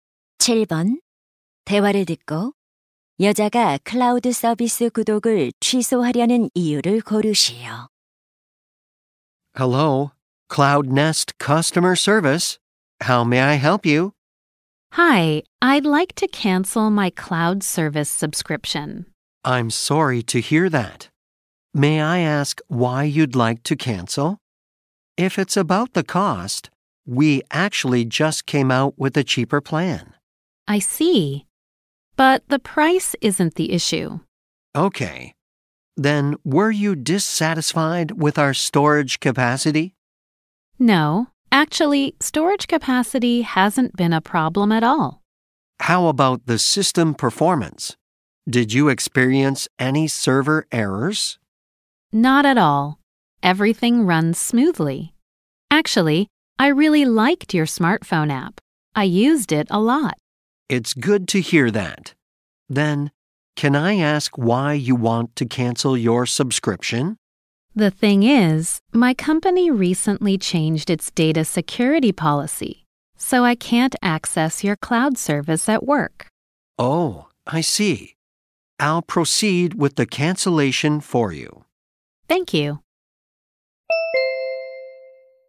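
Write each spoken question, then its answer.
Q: 대화를 듣고 여자가 클라우드 서비스 구독을 취소하려는 이유를 고르시오.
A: 회사의 데이터 보안 정책이 바뀌어 직장에서 접속할 수 없어서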